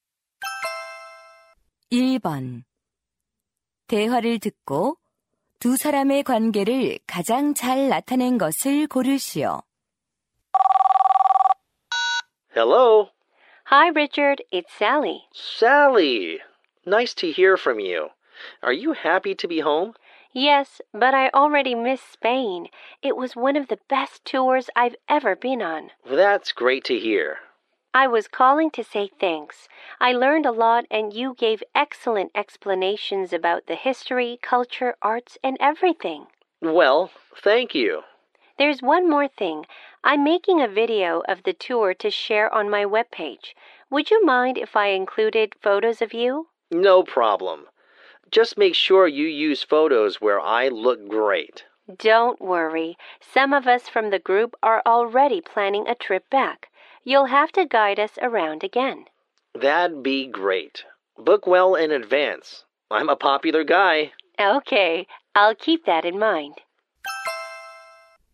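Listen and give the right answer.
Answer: 관광객 - 여행 가이드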